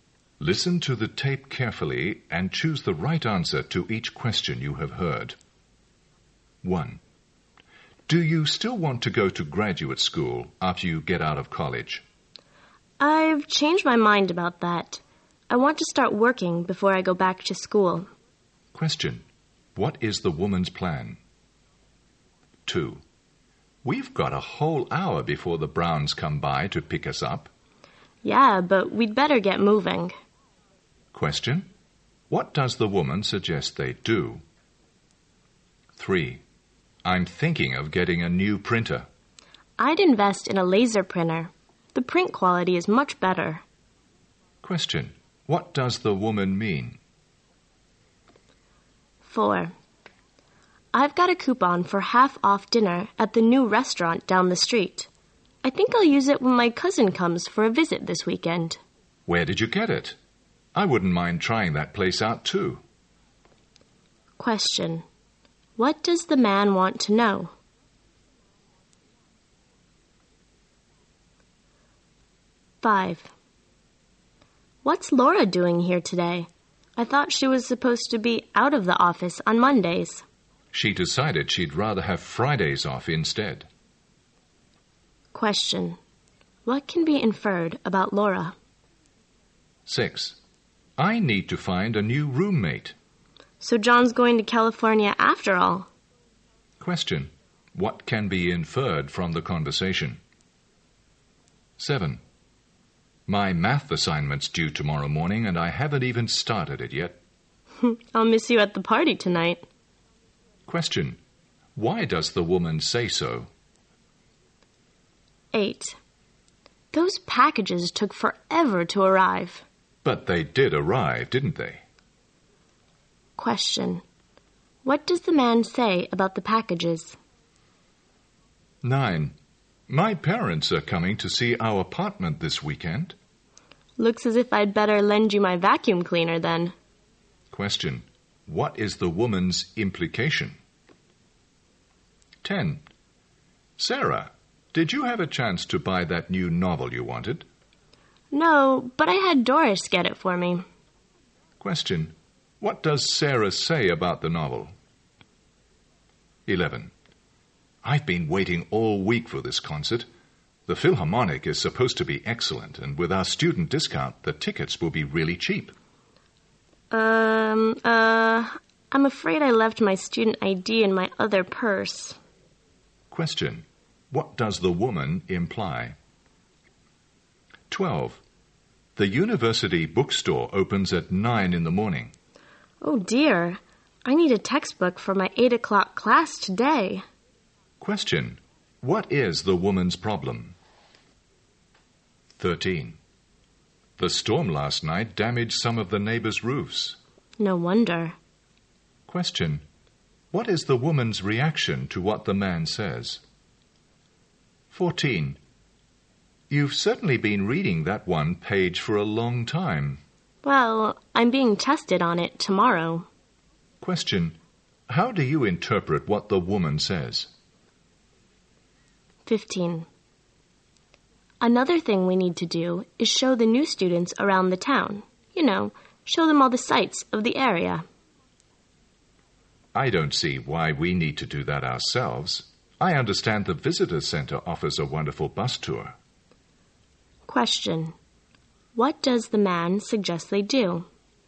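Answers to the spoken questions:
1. To start working before going to graduate school
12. She needs a textbook for her 8 o'clock class but the bookstore opens at 9
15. Have the students take the visitor center's bus tour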